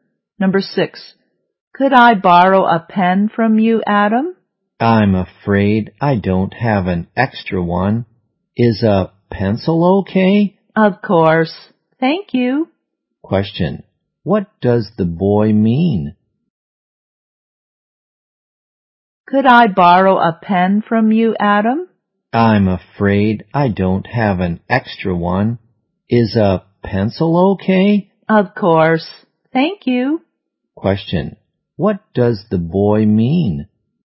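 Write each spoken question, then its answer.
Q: What does the boy mean?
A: He has no extra pen but can lend a pencil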